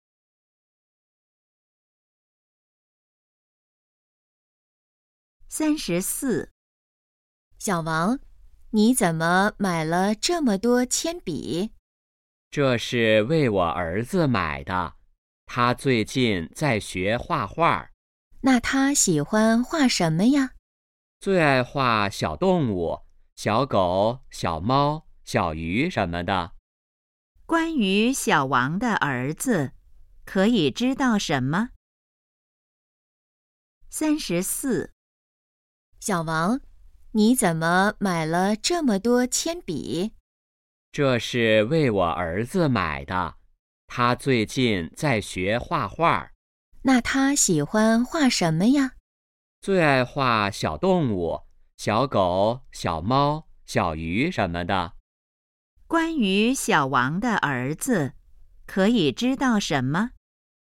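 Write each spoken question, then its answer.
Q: 关于小王的儿子,可以知道什么?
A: 在学画画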